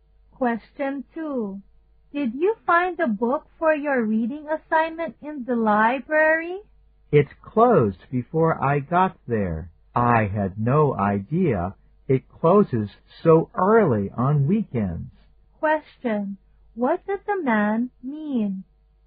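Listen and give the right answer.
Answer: He didn't get the book because the library was already closed.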